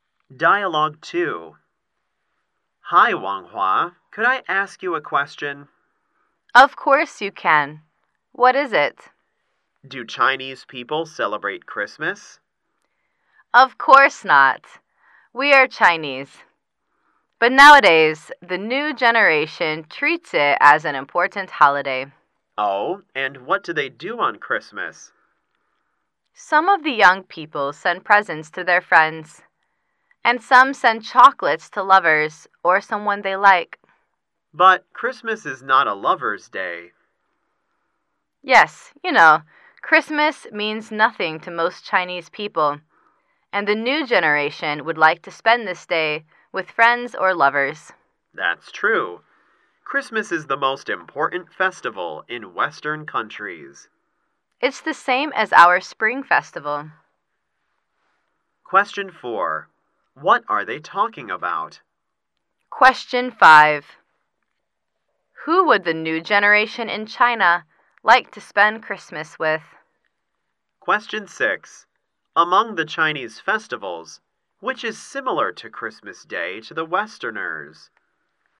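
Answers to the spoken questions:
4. How Chinese people celebrate Christmas
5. Friends or lovers
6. The Spring Festival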